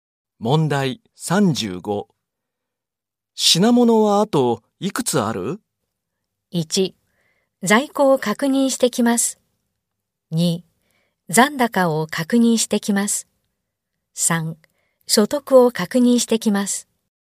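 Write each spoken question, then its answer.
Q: 品物はあといくつある?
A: 1: 在庫を確認してきます。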